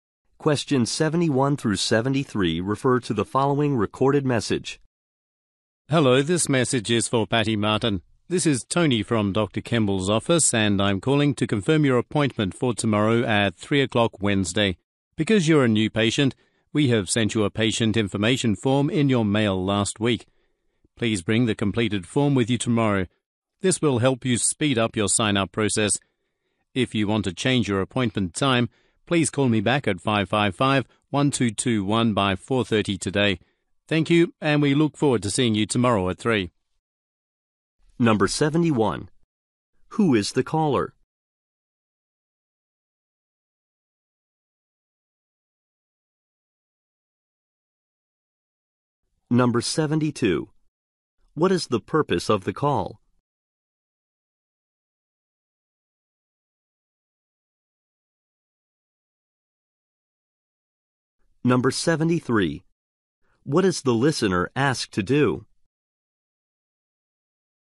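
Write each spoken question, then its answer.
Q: Who is the caller?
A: Tony from Dr. Kemble's office

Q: What is the purpose of the call?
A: To confirm an appointment

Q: What is the listener asked to do?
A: Bring the completed patient information form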